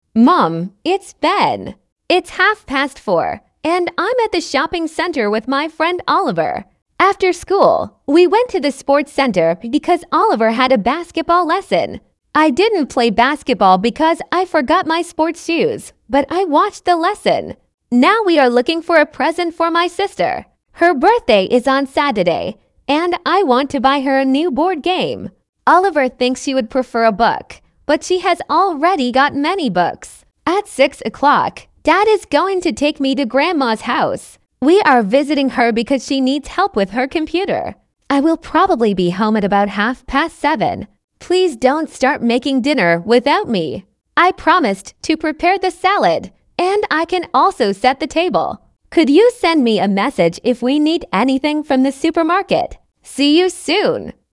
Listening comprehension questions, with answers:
Прослушайте текст и определите, какие из приведённых утверждений A–E соответствуют содержанию текста — 1 (True), а какие не соответствуют — 2 (False). Вы услышите текст дважды.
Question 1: Ben is calling his mother from the sports centre.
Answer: False

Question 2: Ben and Oliver played basketball after school.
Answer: False

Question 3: Ben needs to buy a present for his sister.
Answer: True

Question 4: Ben is going to visit his grandmother today.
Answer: True

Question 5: Ben promises to help prepare dinner.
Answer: True

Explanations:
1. Бен звонит из торгового центра, а не из спортивного центра.
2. Баскетболом занимался только Оливер. Бен забыл спортивную обувь и лишь наблюдал за уроком.
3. Бен ищет подарок для сестры, у которой в субботу день рождения.
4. В шесть часов отец отвезёт Бена к бабушке.
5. Бен обещал приготовить салат и помочь накрыть на стол.

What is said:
Mum, it's Ben.
It's half past four, and I'm at the shopping centre with my friend Oliver. After school, we went to the sports centre because Oliver had a basketball lesson. I didn't play basketball because I forgot my sports shoes, but I watched the lesson.
Now we are looking for a present for my sister. Her birthday is on Saturday, and I want to buy her a new board game. Oliver thinks she would prefer a book, but she has already got many books.
At six o'clock, Dad is going to take me to Grandma's house. We are visiting her because she needs help with her computer. I will probably be home at about half past seven.
Please don't start making dinner without me. I promised to prepare the salad, and I can also set the table. Could you send me a message if we need anything from the supermarket?
See you soon.

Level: 5 класса